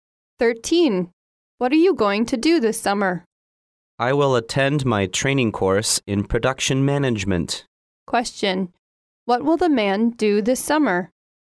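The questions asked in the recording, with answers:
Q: What will the man do this summer?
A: Attend a training course in production management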